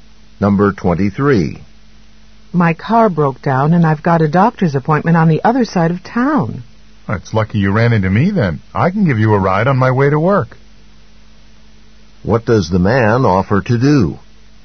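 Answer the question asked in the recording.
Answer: Drive her to her doctor's appointment.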